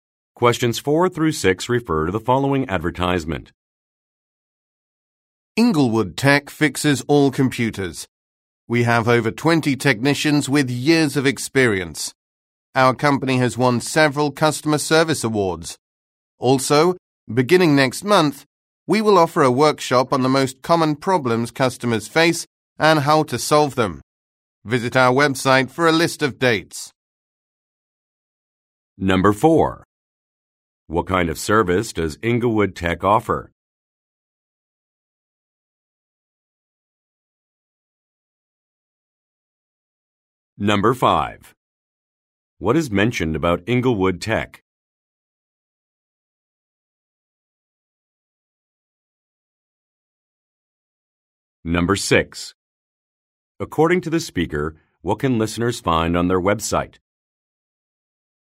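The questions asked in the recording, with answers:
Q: What kind of service does Inglewood Tech offer?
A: Computer repair.

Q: According to the speaker, what can listeners find on their website?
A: A list of workshop dates.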